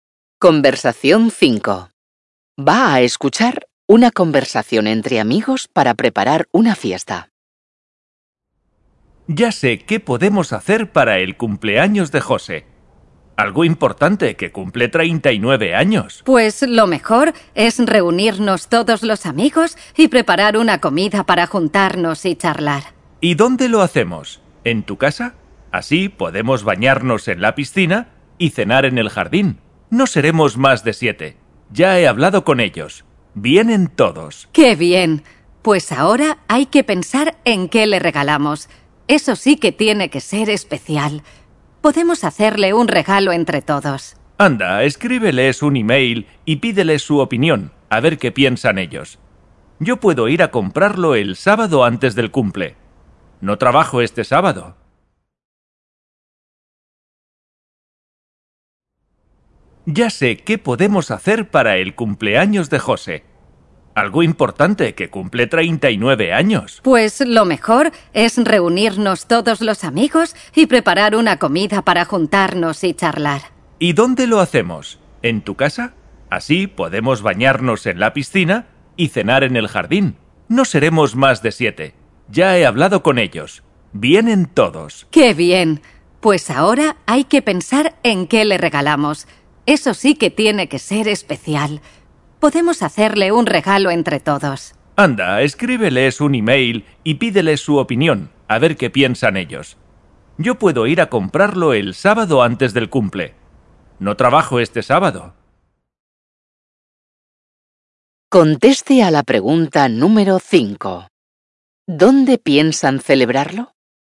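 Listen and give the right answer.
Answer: En casa de uno de los amigos, con piscina y jardín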